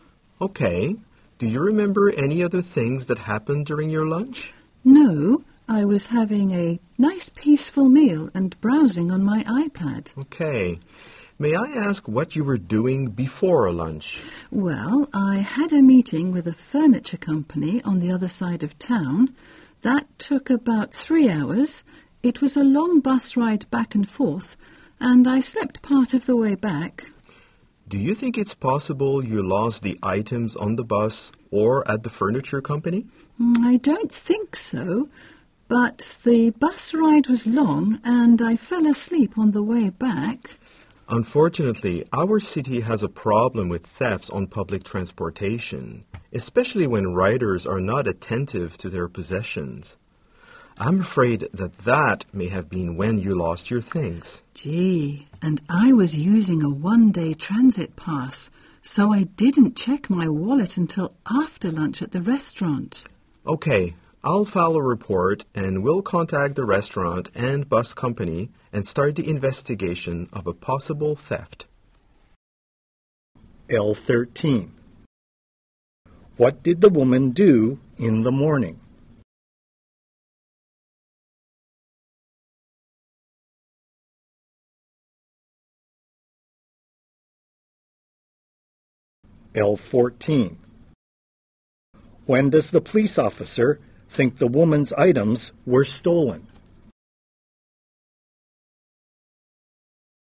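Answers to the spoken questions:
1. She had a meeting with a furniture company
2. On the bus ride back, while she was asleep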